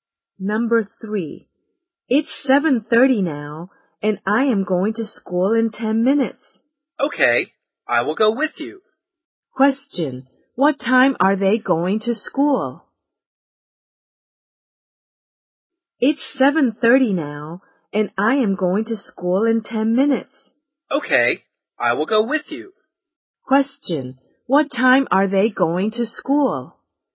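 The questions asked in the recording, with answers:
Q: what time are they going to school?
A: At 7:40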